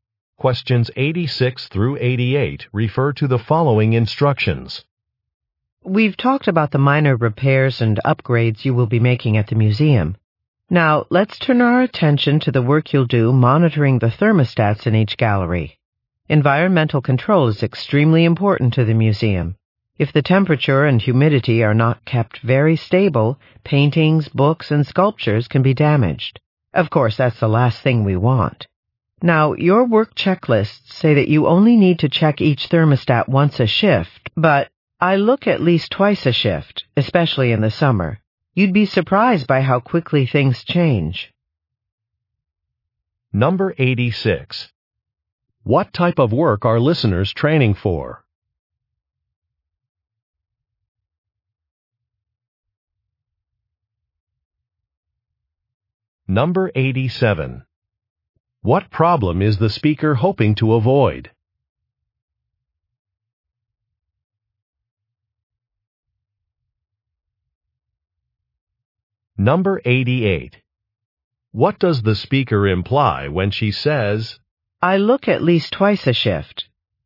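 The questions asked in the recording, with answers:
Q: What type of work are listeners training for?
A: Maintenance work at a museum

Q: What problem is the speaker hoping to avoid?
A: Damage to artwork from unstable temperature and humidity

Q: What does the speaker imply when she says,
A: Listeners should check the thermostats more often than the checklist says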